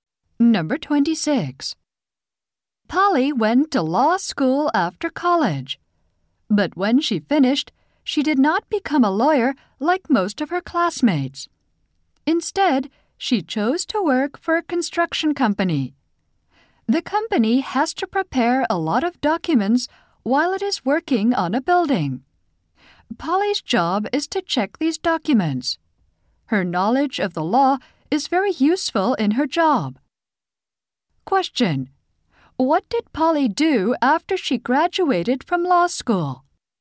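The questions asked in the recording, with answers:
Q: What did Polly do after she graduated from law school?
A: She went to work for a construction company.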